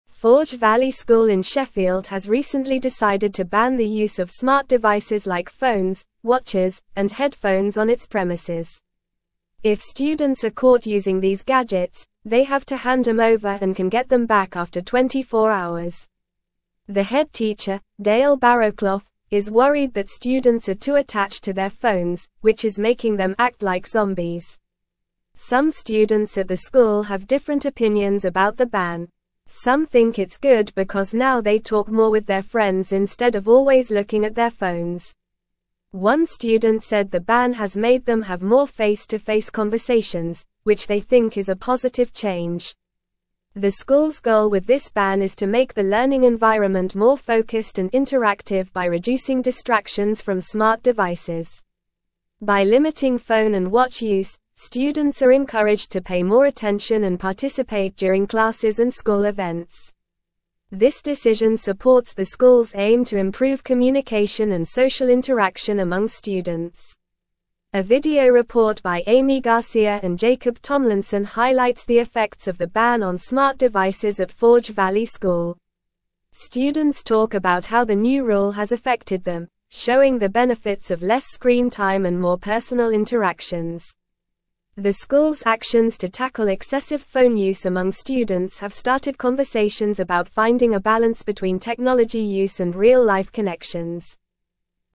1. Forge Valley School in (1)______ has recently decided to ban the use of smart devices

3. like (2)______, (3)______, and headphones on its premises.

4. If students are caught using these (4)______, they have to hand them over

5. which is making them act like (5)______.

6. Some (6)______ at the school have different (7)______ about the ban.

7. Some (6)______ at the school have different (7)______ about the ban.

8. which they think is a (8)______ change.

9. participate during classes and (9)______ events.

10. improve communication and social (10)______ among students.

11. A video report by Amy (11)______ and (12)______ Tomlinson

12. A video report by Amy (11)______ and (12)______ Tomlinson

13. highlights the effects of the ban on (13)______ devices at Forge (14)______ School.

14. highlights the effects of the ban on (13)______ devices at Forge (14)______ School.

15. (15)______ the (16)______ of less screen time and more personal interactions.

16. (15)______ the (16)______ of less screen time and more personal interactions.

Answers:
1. Sheffield
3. watches
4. gadgets
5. zombies
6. students
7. opinions
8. positive
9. school
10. interaction
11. Garcia
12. Jacob
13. smart
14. Valley
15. showing
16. benefits

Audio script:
Forge Valley School in Sheffield has recently decided to ban the use of smart devices like phones, watches, and headphones on its premises. If students are caught using these gadgets, they have to hand them over and can get them back after 24 hours. The head teacher, Dale Barrowclough, is worried that students are too attached to their phones, which is making them act like zombies.
Some students at the school have different opinions about the ban. Some think it's good because now they talk more with their friends instead of always looking at their phones. One student said the ban has made them have more face-to-face conversations, which they think is a positive change.
The school's goal with this ban is to make the learning environment more focused and interactive by reducing distractions from smart devices. By limiting phone and watch use, students are encouraged to pay more attention and participate during classes and school events. This decision supports the school's aim to improve communication and social interaction among students.
A video report by Amy Garcia and Jacob Tomlinson highlights the effects of the ban on smart devices at Forge Valley School. Students talk about how the new rule has affected them, showing the benefits of less screen time and more personal interactions. The school's actions to tackle excessive phone use among students have started conversations about finding a balance between technology use and real-life connections.

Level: Level 3